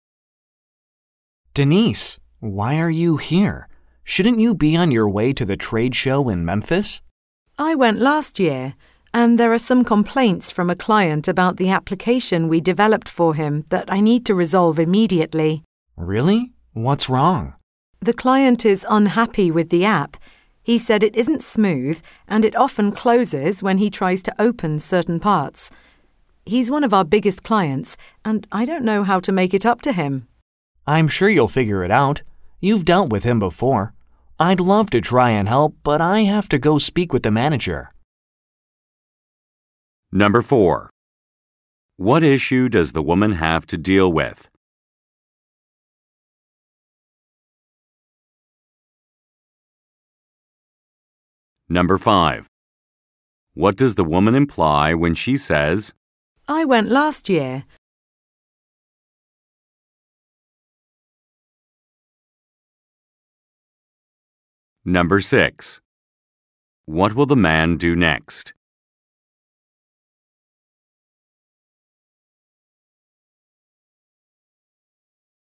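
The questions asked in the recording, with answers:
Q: What issue does the woman have to deal with?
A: A client's complaints about an app the company developed

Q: What will the man do next?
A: Speak with the manager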